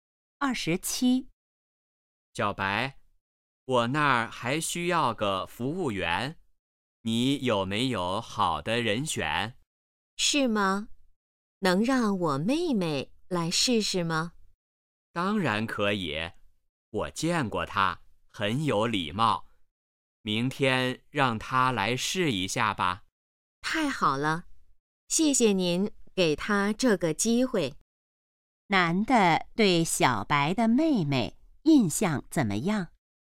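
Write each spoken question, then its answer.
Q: 男的对小白的妹妹印象怎么样?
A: 很有礼貌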